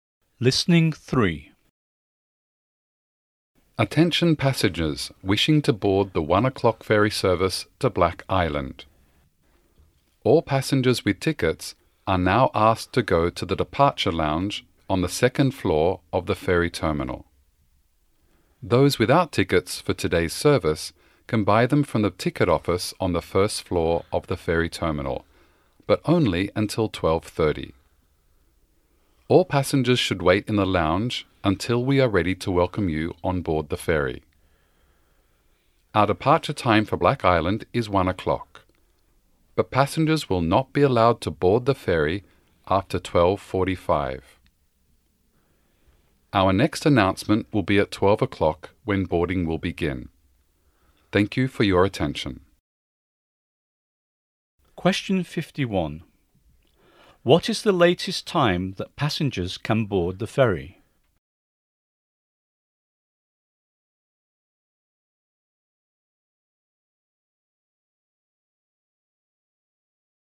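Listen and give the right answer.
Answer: 12:45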